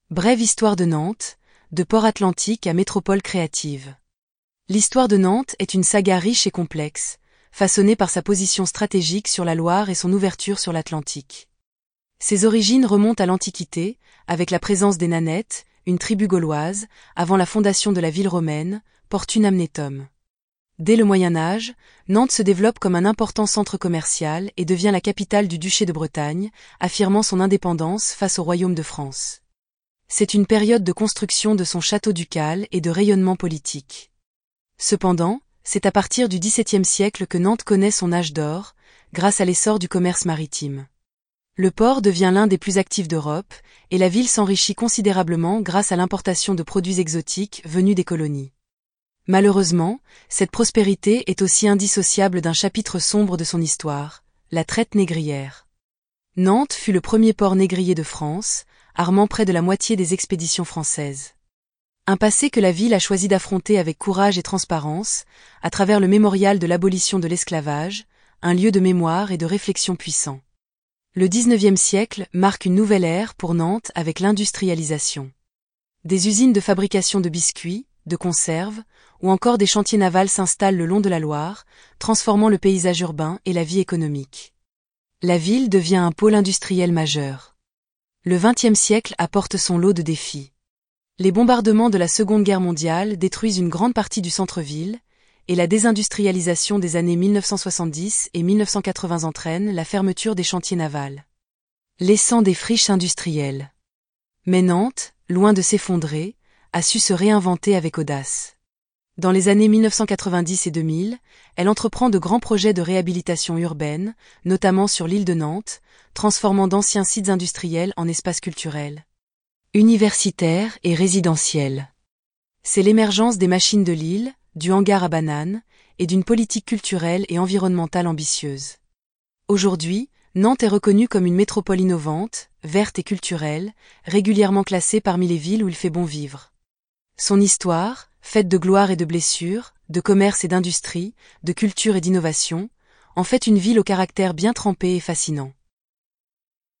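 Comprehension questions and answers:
Écoutez l'enregistrement et indiquez si ces phrases sont vraies ou fausses.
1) Nantes a toujours été une petite ville sans importance historique.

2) Son développement a été fortement influencé par sa position sur la Loire.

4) Nantes était le deuxième port négrier de France.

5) La ville n'a jamais abordé son passé lié à l'esclavage.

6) Le XIXe siècle a vu l'arrivée de grandes industries à Nantes.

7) Les bombardements de la Seconde Guerre Mondiale ont épargné le centre-ville.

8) La ville s'est effondrée après la désindustrialisation et n'a pas su se réinventer.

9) Les Machines de l'Île sont un exemple de la réhabilitation urbaine récente.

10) Nantes est aujourd'hui reconnue pour son dynamisme culturel et environnemental.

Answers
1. Faux
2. Vrai
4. Faux
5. Faux
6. Vrai
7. Faux
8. Faux
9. Vrai
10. Vrai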